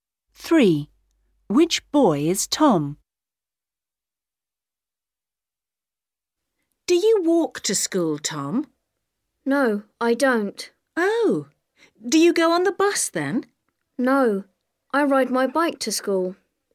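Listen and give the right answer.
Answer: The boy who rides his bike to school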